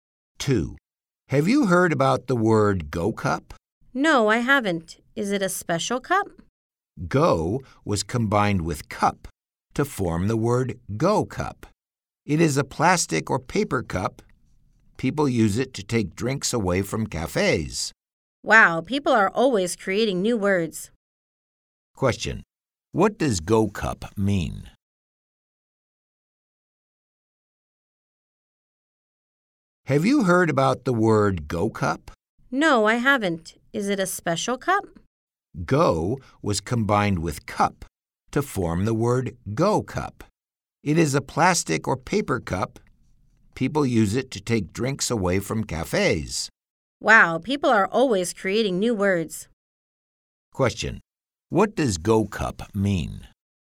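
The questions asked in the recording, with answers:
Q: Question. What does Go Cup mean?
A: A plastic or paper cup used to take drinks away from cafes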